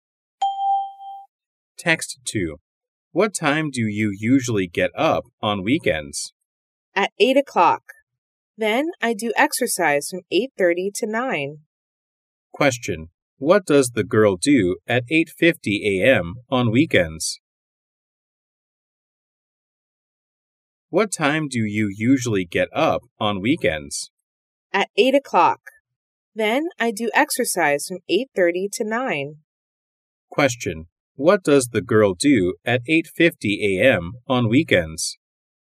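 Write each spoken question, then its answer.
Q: What does the girl do at 8:50 a.m. on weekends?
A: She does exercise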